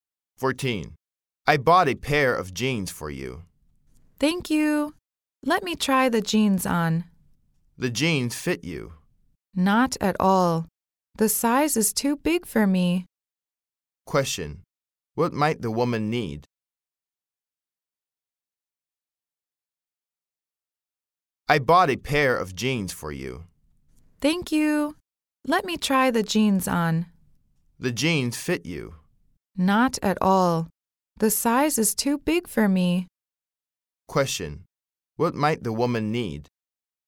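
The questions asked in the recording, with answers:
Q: Question. What might the woman need?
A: A smaller pair of jeans.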